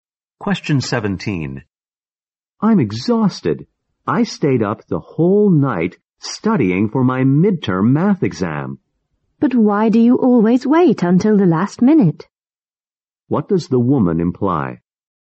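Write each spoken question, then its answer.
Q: What does the woman imply?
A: The man shouldn't leave his studying until the last minute.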